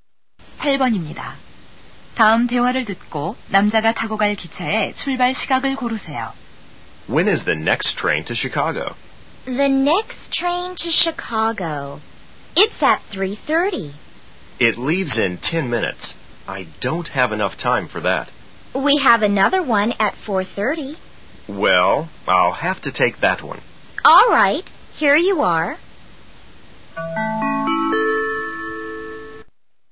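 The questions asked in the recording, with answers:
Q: 다음 대화를 듣고 남자가 타고 갈 기차의 출발 시각을 고르세요.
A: 4시 30분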